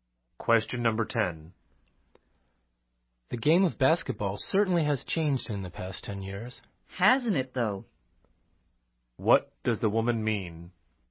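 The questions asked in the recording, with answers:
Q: What does the woman mean?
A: She agrees that basketball has changed a lot in the past 10 years.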